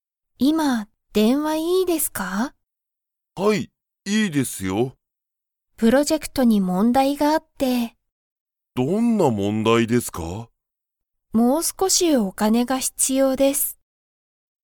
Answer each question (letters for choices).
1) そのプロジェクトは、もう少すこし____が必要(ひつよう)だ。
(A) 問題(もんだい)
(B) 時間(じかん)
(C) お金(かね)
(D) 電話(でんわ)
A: C

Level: Level 1